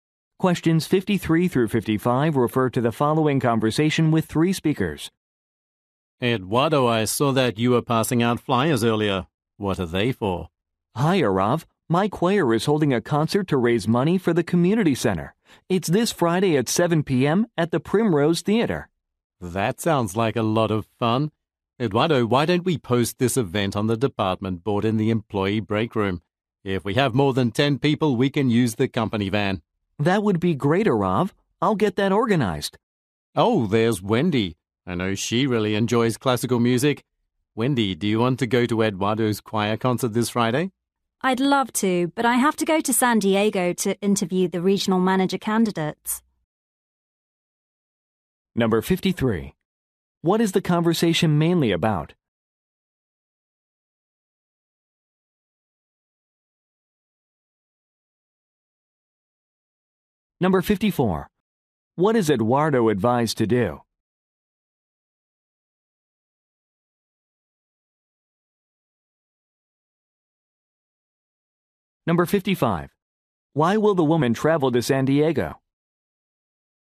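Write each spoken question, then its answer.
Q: What is the conversation mainly about?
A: A choir concert raising money for the community center

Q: What is Eduardo advised to do?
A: Post the event on the department board

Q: Why will the woman travel to San Diego?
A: To interview candidates for regional manager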